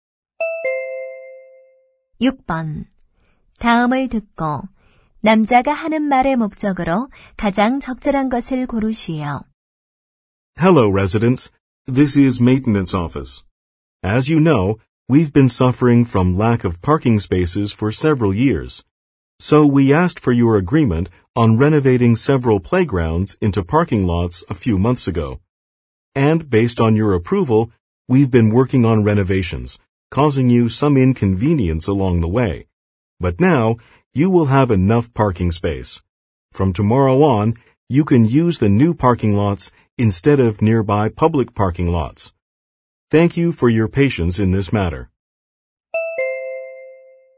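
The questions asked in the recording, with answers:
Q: 다음을 듣고 남자가 하는 말의 목적으로 가장 적절한 것을 고르시오.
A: 새 주차장 사용 개시 안내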